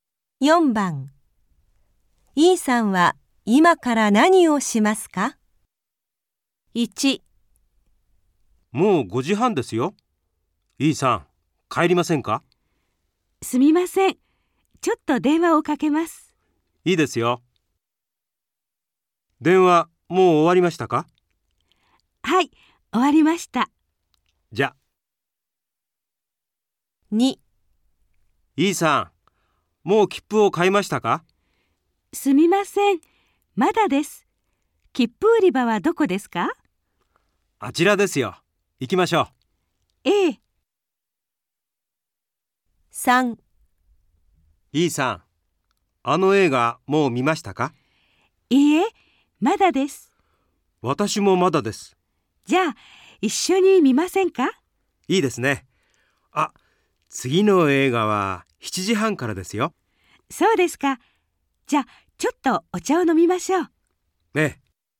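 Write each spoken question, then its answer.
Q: E さんは今から何をしますか?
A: 切符を買います

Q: E さんは今から何をしますか?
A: お茶を飲みます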